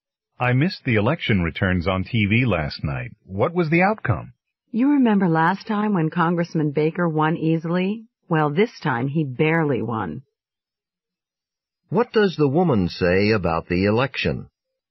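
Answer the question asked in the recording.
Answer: Congressman Baker won by a small margin this time.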